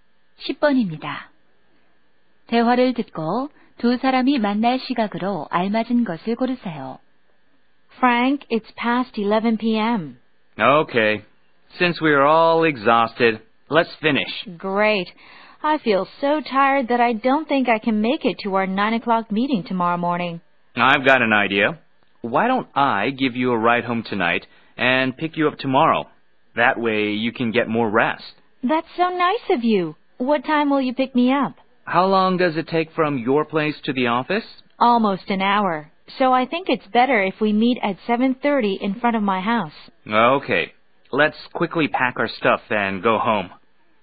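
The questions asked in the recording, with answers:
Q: 대화를 듣고 두 사람이 만날 시각으로 알맞은 것을 고르세요.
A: 7시 30분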